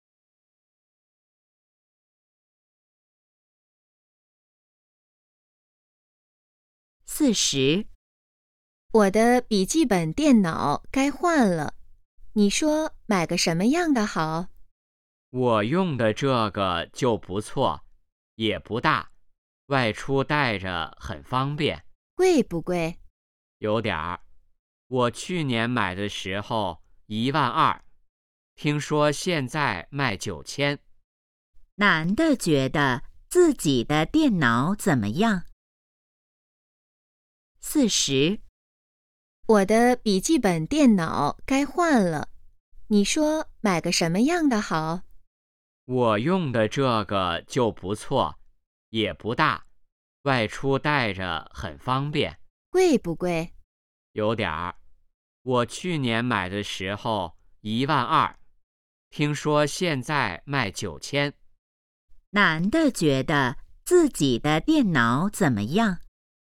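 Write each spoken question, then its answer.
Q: 男的觉得自己的电脑怎么样?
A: 不错,不大,带着方便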